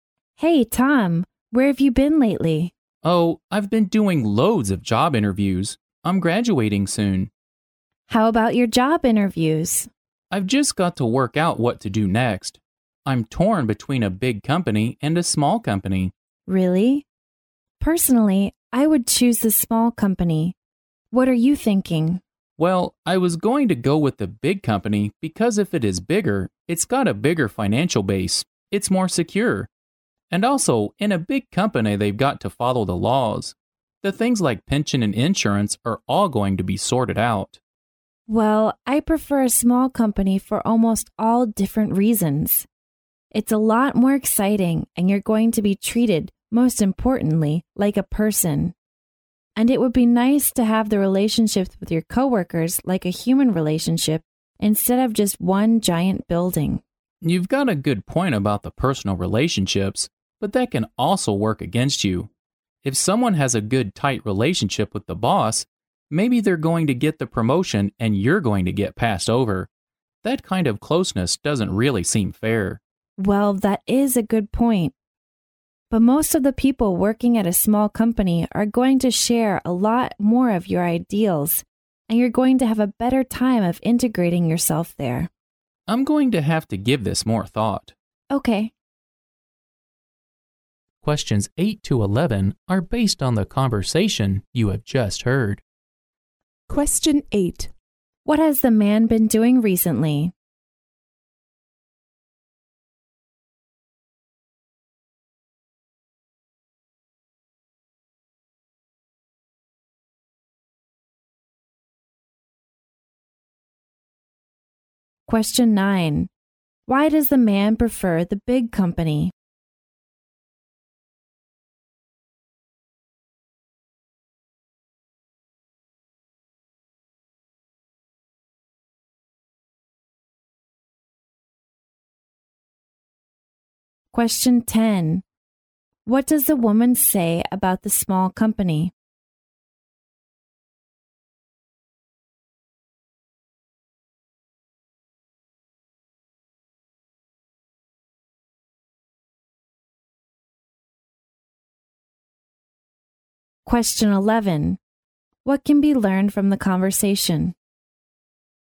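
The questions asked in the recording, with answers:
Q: What has the man been doing recently?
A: Doing lots of job interviews

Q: Why does the man prefer the big company?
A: It is more financially secure and follows the laws on pension and insurance

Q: What does the woman say about the small company?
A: It is more exciting and you are treated like a person, with closer relationships with coworkers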